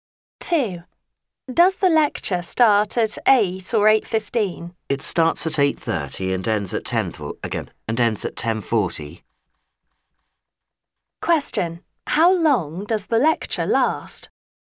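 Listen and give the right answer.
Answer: 2 hours and 10 minutes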